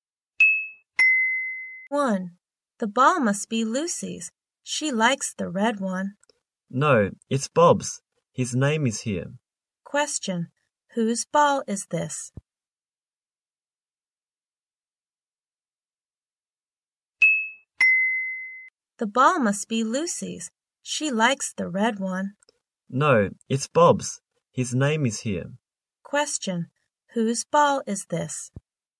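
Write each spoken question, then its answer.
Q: Whose ball is this?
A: Bob's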